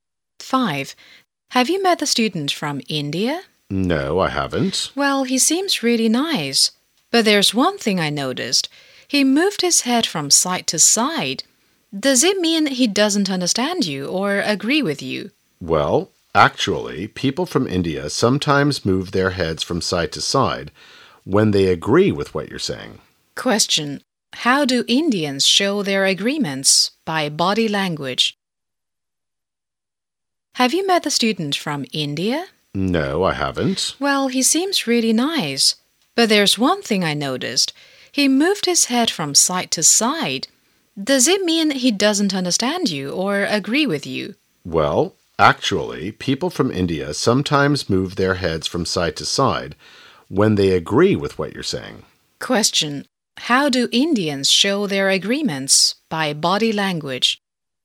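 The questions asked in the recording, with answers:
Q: Question. How do Indians show their agreements?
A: By moving their heads from side to side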